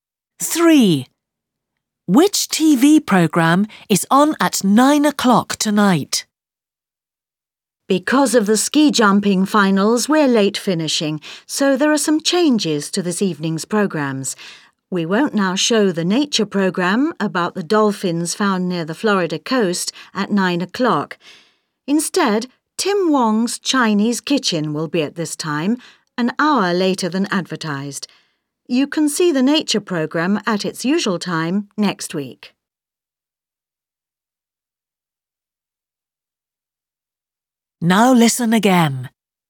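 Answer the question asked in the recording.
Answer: Tim Wong's Chinese Kitchen (a cooking programme)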